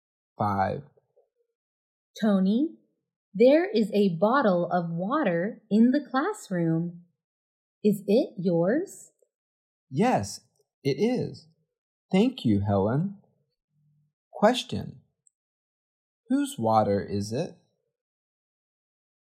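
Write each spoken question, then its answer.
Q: Whose water is it?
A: Tony's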